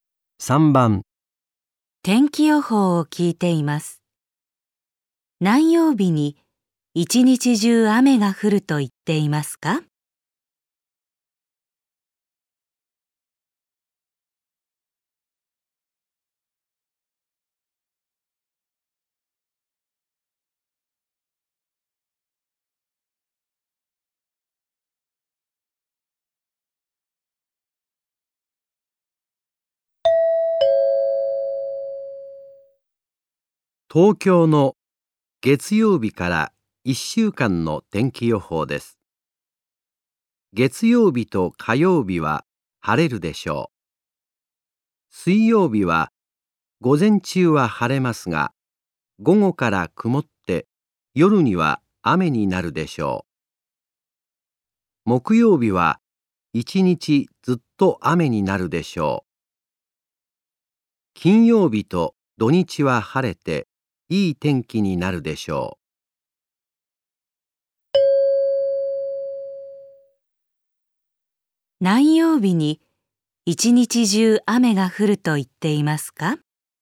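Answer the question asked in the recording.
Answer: 木曜日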